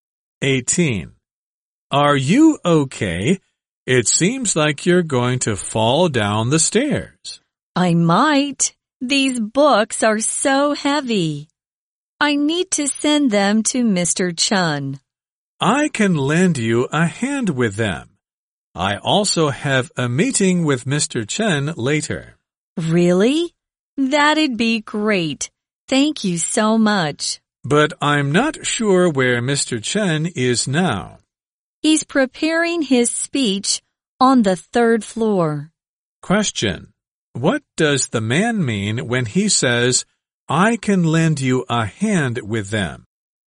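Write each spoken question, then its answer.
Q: What does the man mean when he says, I can lend you a hand with them?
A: He will help her carry the books.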